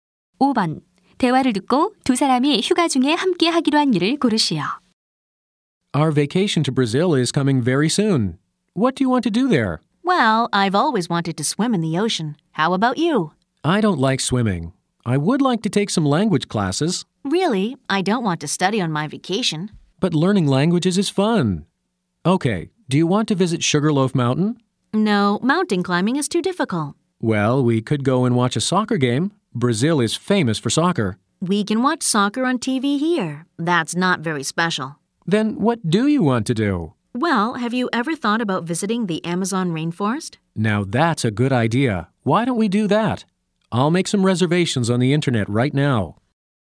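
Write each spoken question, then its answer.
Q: 대화를 듣고 두 사람이 휴가 중에 함께 하기로 한 일을 고르시오.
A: 아마존 열대우림 방문하기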